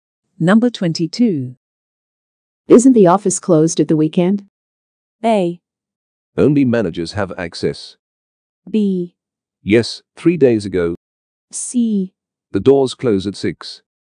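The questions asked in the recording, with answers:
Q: Isn't the office closed at the weekend?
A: A: Only managers have access.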